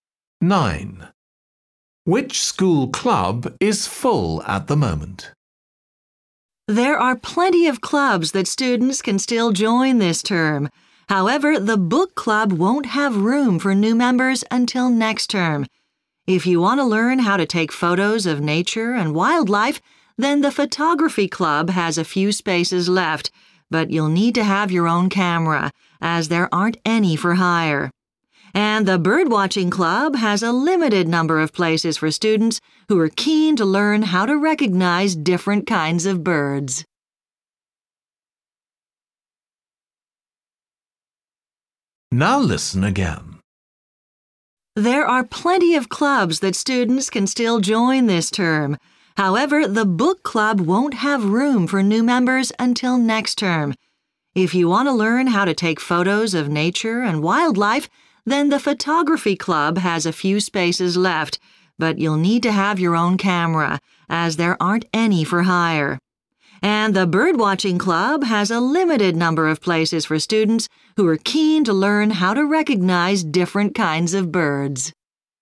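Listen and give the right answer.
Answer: the book club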